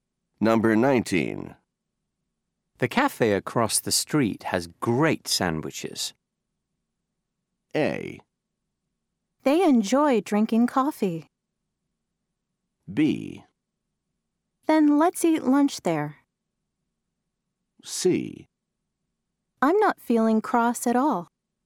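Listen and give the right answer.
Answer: B: Then let's eat lunch there.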